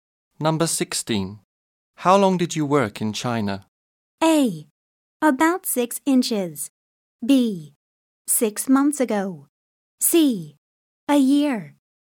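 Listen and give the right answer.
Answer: C: A year.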